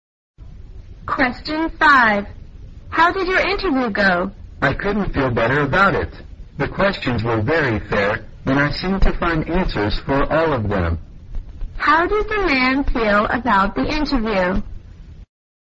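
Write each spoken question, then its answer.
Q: How did the man feel about the interview?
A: Very good; confident it went well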